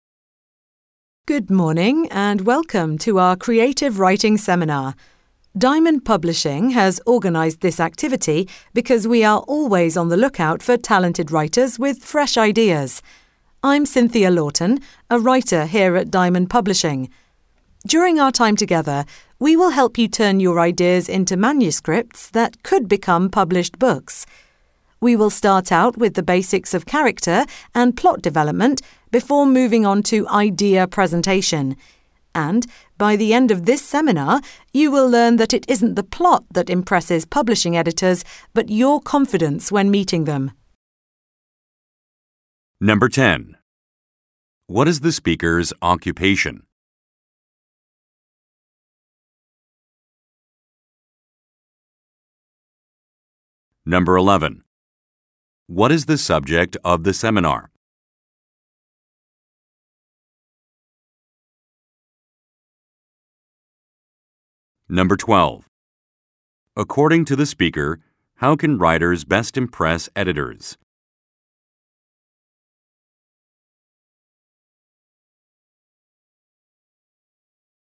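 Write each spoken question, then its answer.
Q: What is the speaker's occupation?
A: A writer

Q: What is the subject of the seminar?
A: Creative writing

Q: According to the speaker, how can writers best impress editors?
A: By being confident when meeting them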